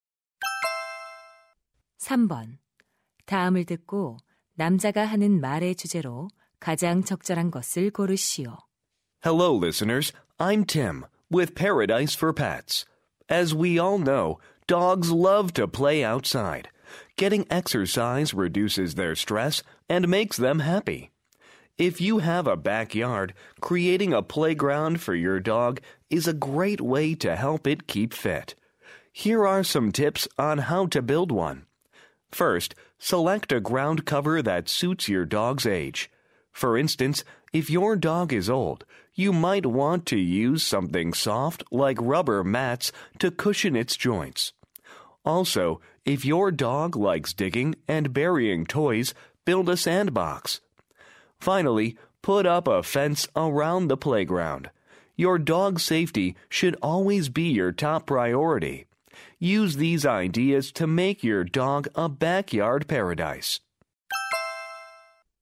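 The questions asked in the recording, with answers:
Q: 다음을 듣고 남자가 하는 말의 주제로 가장 적절한 것을 고르시오.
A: 반려견을 위한 뒷마당 놀이터 만드는 방법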